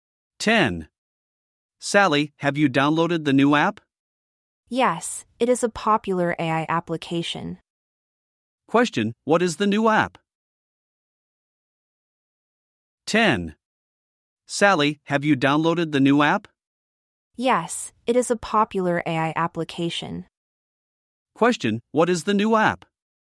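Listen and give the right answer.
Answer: A popular AI application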